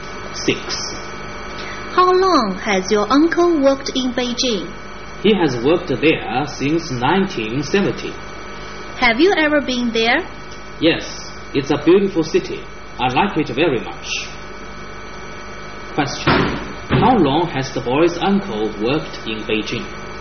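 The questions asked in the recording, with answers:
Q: How long has the boy's uncle worked in Beijing?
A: Since 1970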